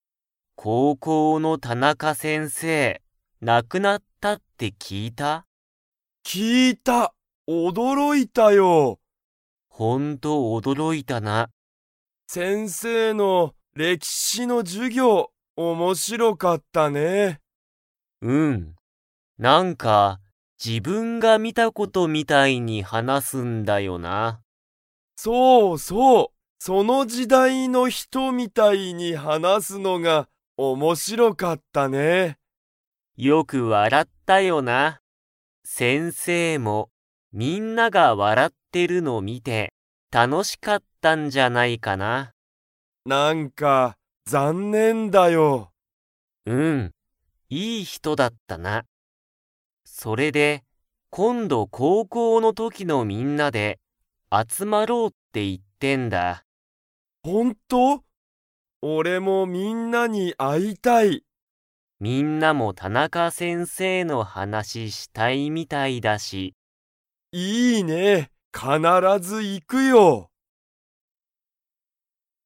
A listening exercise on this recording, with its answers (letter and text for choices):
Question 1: 先生せんせいは、歴史れきしの授業じゅぎょうでどのように話はなしましたか?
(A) 映画えいがのように話はなした。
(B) 驚おどろきながら話はなした。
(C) その時代じだいの人ひとみたいに話はなした。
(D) 何なにも話はなさなかった。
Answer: (C) その時代じだいの人ひとみたいに話はなした。

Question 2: 高校こうこうの時ときのみんなで、 。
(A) 集あつまる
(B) 集あつまらない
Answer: (A) 集あつまる

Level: Level 3